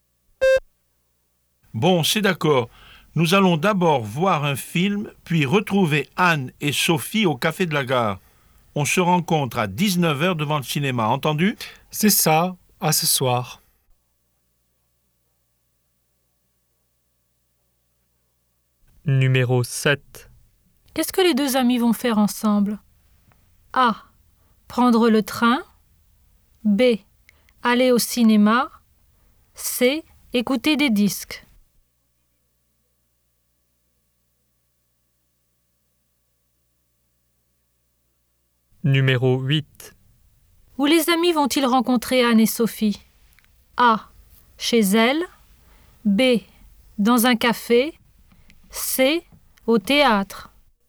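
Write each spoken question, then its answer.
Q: Qu'est-ce que les deux amis vont faire ensemble?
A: B: Aller au cinéma.

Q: Où les amis vont-ils rencontrer Anne et Sophie?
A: B: Dans un café.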